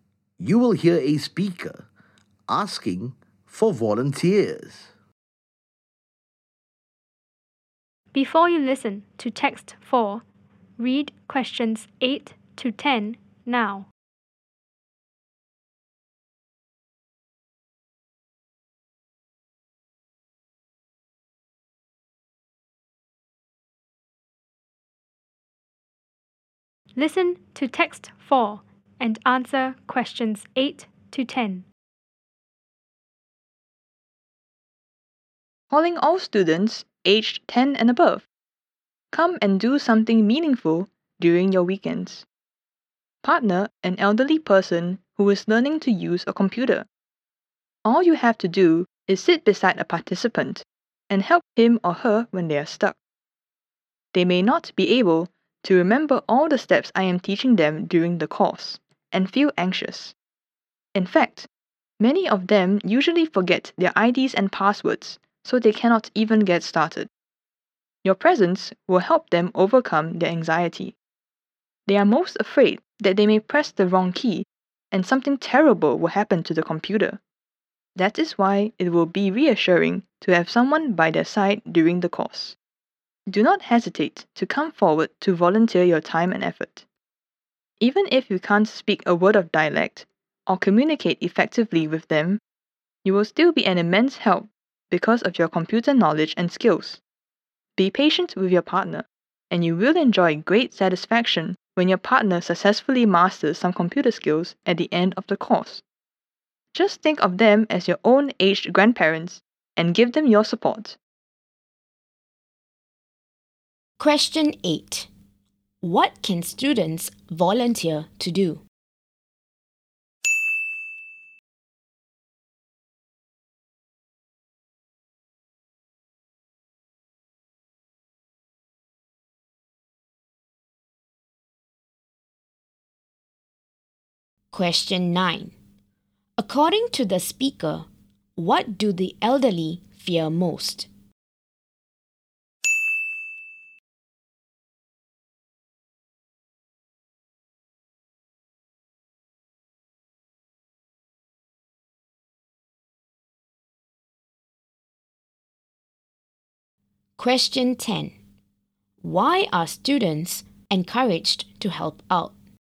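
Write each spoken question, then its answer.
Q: What can students volunteer to do?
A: Partner an elderly person learning to use a computer on weekends

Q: According to the speaker, what do the elderly fear most?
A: Pressing the wrong key and something terrible happening to the computer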